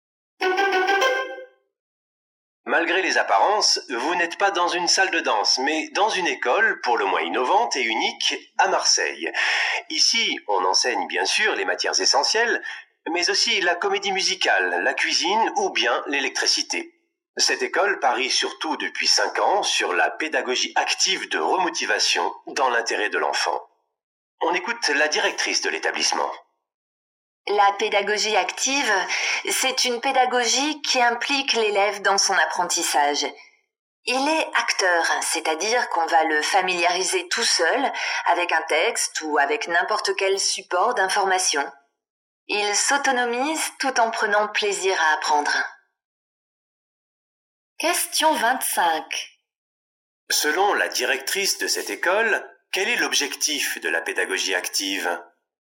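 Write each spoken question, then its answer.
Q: Selon la directrice de cette école, quel est l'objectif de la pédagogie active ?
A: Rendre l'élève acteur et autonome tout en prenant plaisir à apprendre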